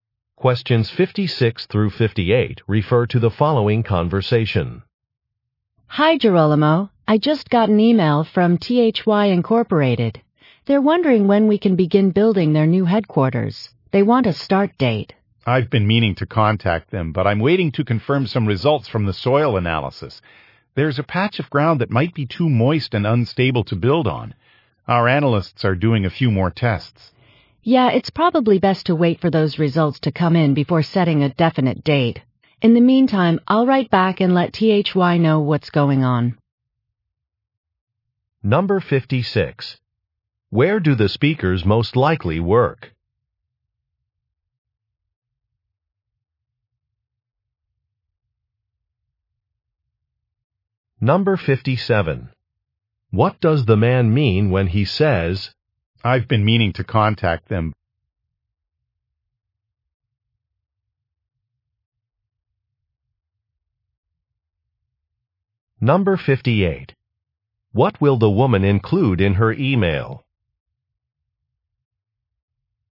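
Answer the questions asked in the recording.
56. At a construction company
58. An explanation of the delay for soil test results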